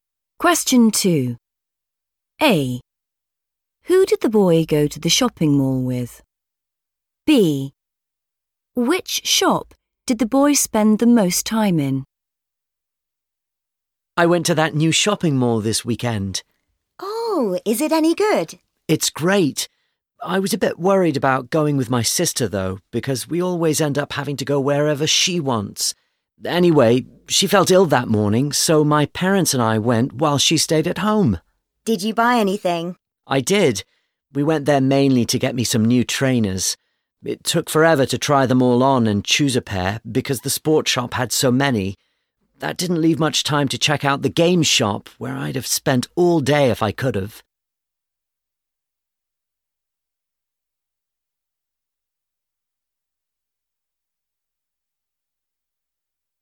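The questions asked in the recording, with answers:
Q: Who did the boy go to the shopping mall with?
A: his parents

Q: Which shop did the boy spend the most time in?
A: the sports shop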